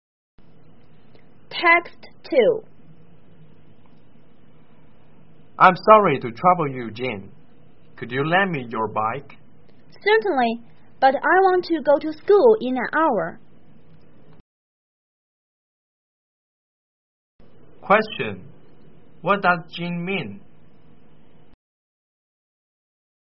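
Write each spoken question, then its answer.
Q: What does Jin mean?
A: He will lend the bike, but he needs it back within an hour to go to school.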